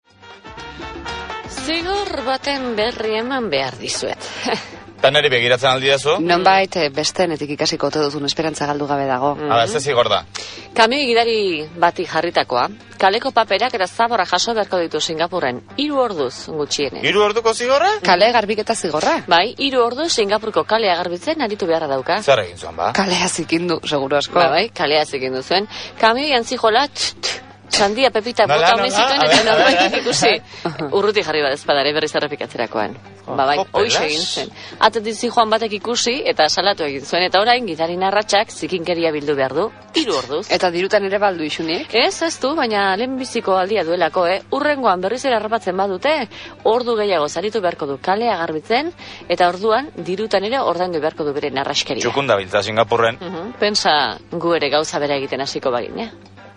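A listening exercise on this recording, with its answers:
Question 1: Non gertatu zen? ¿Dónde ocurrió?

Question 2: Zer gertatu zen? ¿Qué ocurrió?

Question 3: Nor da protagonista? ¿Quién es el protagonista?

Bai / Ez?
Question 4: Pipak bota zituen? ¿Tiró pipas?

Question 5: 3 eguneko zigorra jarri diote? ¿Le han impuesto un castigo de 3 días?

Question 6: Udaltzain batek salatu zuen? ¿Lo denundió un policía municipal?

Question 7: Dirua ere ordaindu behar izan du? ¿También ha tenido que pagar dinero?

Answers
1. Singapurren
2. Kamio-gidari bati 3 orduko zigorra jarri diote kalea zikintzeagatik.
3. Singapurreko kamio-gidari bat
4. Bai
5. Ez
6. Ez
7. Ez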